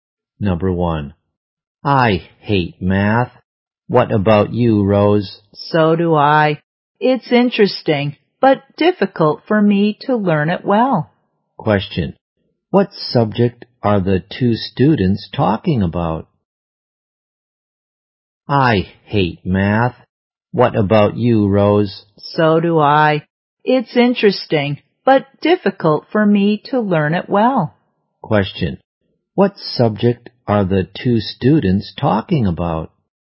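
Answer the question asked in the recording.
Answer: Math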